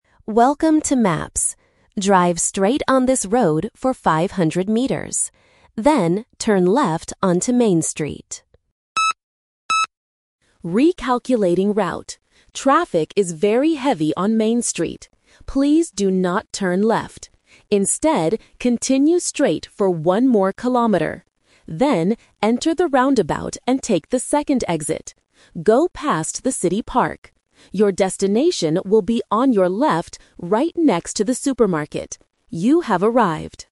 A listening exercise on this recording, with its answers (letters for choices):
Listen to the automated voice from a GPS navigation app. Choose the correct answer (A, B, or C) for each question.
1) Why does the GPS change the route?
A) Because Main Street is closed for repairs.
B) Because the traffic is very heavy.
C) Because the driver missed the turn.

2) What should the driver do at the roundabout?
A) Turn left.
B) Take the first exit.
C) Take the second exit.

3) Where is the final destination located?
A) On the left, next to the supermarket.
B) On the right, inside the city park.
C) On the left, next to Main Street.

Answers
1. B
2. C
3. A

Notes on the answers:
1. The Key: The GPS voice explains the "Twist" clearly: "Recalculating route. Traffic is very heavy on Main Street." The Trap: Option (A) is a very common reason for changing routes in A2 listening tests (and was used in our previous exercises), but it is not mentioned here. Option (C) is a plausible real-life situation, but the audio does not say the driver made a mistake.
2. The Key: The direct instruction is: "...enter the roundabout and take the second exit." The Trap: Option (A) "Turn left" was the original instruction before the GPS recalculated the route. Listeners who stop paying attention after the first sentence will fall into this trap. Option (B) is just a plausible incorrect direction.
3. The Key: The GPS gives the exact location: "Your destination will be on your left, right next to the supermarket." The Trap: Option (B) mentions the "park," but the park is only a landmark the driver must "go past." Option (C) uses "Main Street", which is the street they were told to avoid entirely.

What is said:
GPS Voice: Welcome to Maps. Drive straight on this road for 500 meters. Then, turn left onto Main Street.
GPS Voice: Recalculating route. Traffic is very heavy on Main Street. Please do not turn left. Instead, continue straight for one more kilometer. Then, enter the roundabout and take the second exit. Go past the city park. Your destination will be on your left, right next to the supermarket. You have arrived.